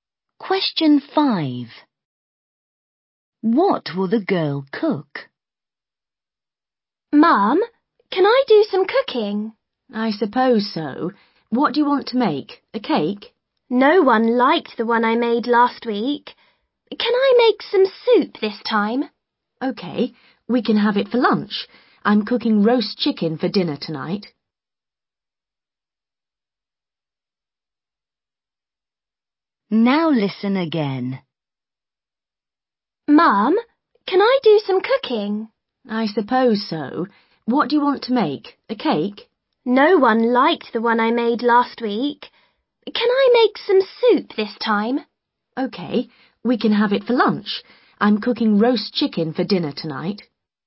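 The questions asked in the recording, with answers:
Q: What will the girl cook?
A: Soup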